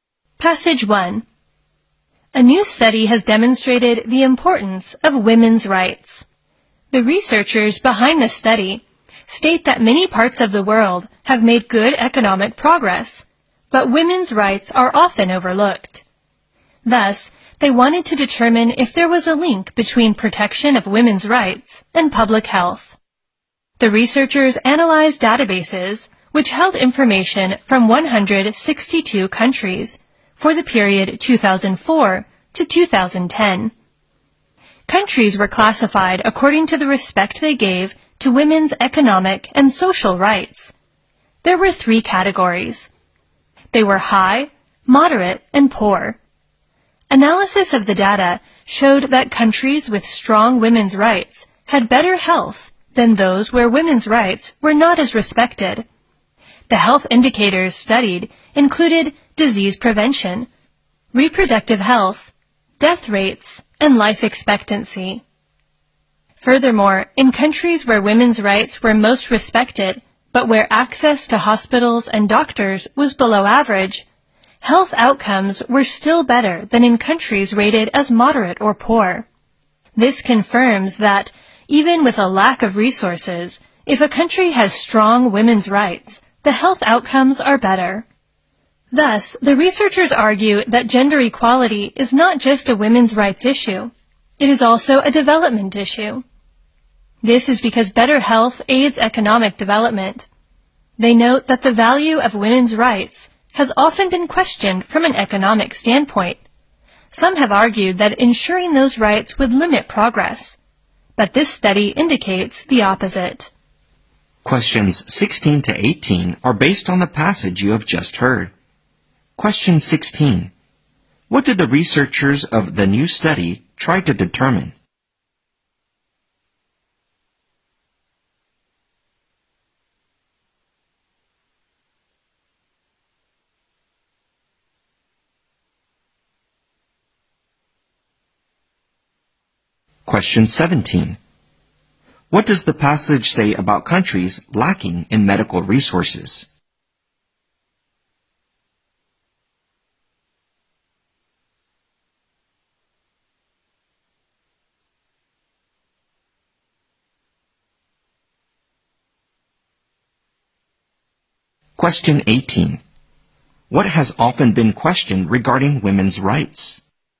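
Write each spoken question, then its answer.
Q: What did the researchers of the new study try to determine?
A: Whether protecting women's rights is linked to public health

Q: What does the passage say about countries lacking in medical resources?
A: If they have strong women's rights, their health outcomes are still better

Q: What has often been questioned regarding women's rights?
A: Their value from an economic standpoint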